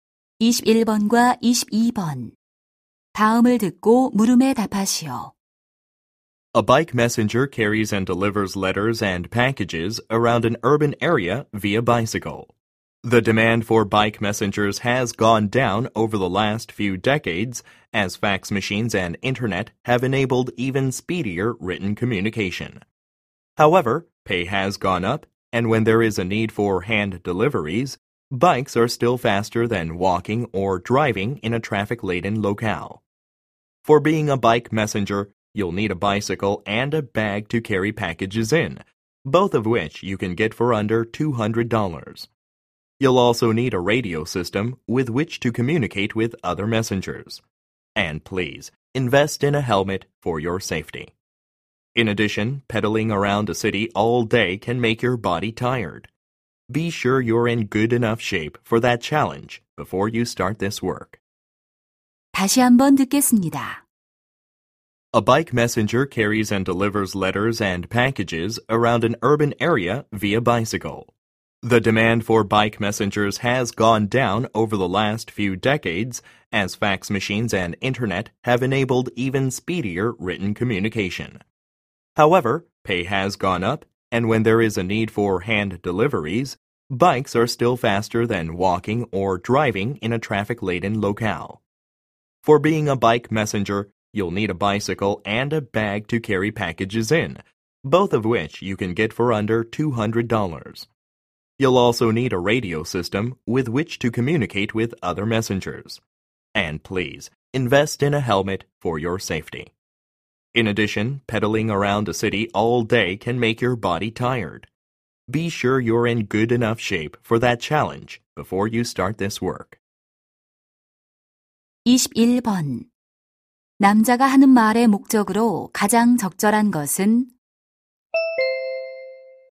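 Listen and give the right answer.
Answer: 바이크 메신저 직업을 소개하려고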